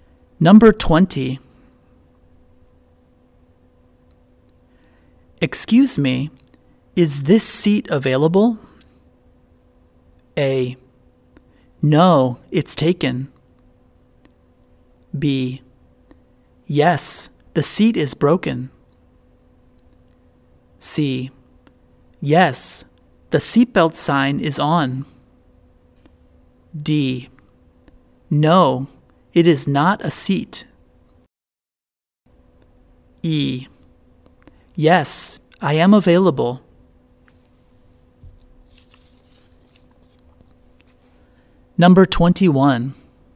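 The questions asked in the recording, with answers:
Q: Excuse me, is this seat available?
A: A: No, it's taken.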